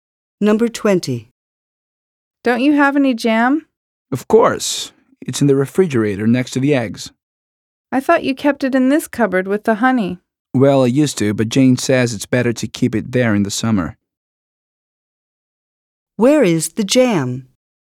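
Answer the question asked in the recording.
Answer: In the refrigerator next to the eggs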